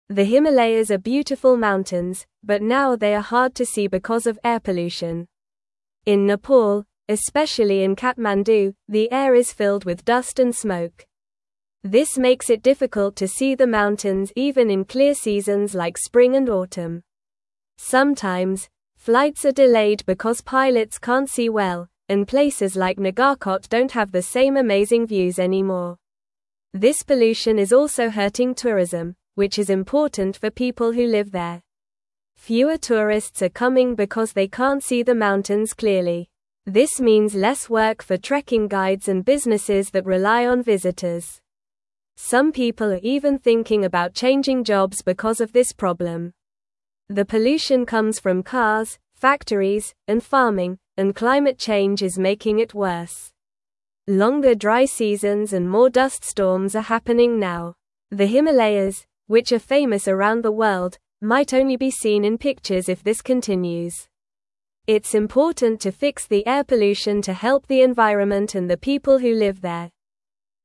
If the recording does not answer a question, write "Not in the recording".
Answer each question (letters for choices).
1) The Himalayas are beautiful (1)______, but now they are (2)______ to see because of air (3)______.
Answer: mountains

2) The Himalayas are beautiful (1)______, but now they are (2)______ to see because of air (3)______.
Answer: hard

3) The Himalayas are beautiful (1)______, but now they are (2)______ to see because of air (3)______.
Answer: pollution

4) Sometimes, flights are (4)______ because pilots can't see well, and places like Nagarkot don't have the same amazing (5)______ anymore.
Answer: delayed

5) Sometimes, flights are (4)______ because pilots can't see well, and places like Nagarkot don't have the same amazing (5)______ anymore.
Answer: views

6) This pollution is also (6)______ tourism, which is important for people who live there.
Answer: hurting

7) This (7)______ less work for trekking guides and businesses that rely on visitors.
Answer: means

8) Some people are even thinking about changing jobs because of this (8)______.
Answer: problem

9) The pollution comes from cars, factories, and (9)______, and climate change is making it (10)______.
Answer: farming

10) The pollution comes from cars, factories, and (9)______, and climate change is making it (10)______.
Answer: worse

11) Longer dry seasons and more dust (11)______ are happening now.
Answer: storms

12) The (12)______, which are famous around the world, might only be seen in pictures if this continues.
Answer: Himalayas

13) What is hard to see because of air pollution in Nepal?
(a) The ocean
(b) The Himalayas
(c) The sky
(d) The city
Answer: b

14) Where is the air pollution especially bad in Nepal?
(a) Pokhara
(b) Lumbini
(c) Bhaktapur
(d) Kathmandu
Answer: d

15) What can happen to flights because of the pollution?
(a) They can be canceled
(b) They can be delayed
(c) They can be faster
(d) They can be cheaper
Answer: b

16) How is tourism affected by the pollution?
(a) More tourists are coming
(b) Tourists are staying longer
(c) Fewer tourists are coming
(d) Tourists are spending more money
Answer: c

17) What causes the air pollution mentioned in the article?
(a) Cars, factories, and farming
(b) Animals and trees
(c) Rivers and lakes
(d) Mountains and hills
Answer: a

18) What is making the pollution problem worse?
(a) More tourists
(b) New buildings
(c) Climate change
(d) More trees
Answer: c

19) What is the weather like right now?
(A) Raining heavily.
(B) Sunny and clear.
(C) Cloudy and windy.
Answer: Not in the recording

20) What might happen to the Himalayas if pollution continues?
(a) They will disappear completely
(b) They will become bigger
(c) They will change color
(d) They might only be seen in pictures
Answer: d

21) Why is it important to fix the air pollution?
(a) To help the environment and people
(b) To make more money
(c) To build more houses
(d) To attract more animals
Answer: a

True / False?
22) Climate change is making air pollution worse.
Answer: True

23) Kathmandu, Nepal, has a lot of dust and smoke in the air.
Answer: True

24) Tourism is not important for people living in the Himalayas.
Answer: False

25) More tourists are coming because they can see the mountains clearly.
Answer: False

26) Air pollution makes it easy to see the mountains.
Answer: False

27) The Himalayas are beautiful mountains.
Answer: True

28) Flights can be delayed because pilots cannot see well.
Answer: True

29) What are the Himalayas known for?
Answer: The Himalayas are known for being beautiful mountains.

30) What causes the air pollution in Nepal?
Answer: The air pollution comes from cars, factories, and farming.

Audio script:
The Himalayas are beautiful mountains, but now they are hard to see because of air pollution. In Nepal, especially in Kathmandu, the air is filled with dust and smoke. This makes it difficult to see the mountains even in clear seasons like spring and autumn. Sometimes, flights are delayed because pilots can't see well, and places like Nagarkot don't have the same amazing views anymore.
This pollution is also hurting tourism, which is important for people who live there. Fewer tourists are coming because they can't see the mountains clearly. This means less work for trekking guides and businesses that rely on visitors. Some people are even thinking about changing jobs because of this problem.
The pollution comes from cars, factories, and farming, and climate change is making it worse. Longer dry seasons and more dust storms are happening now. The Himalayas, which are famous around the world, might only be seen in pictures if this continues. It's important to fix the air pollution to help the environment and the people who live there.

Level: Level 2